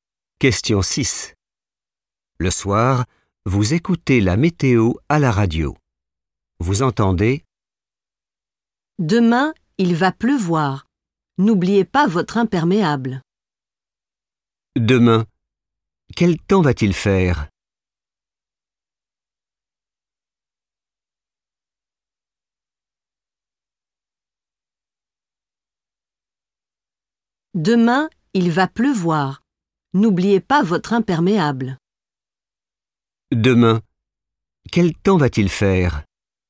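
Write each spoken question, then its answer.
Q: Demain, quel temps va-t-il faire?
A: il va pleuvoir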